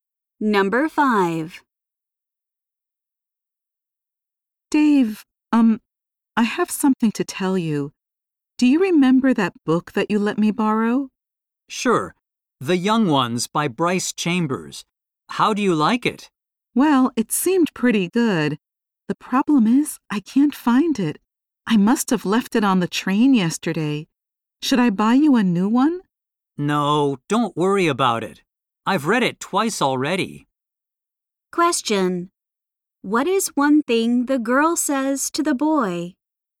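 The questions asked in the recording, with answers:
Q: What is one thing the girl says to the boy?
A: She lost the book he lent her (left it on the train).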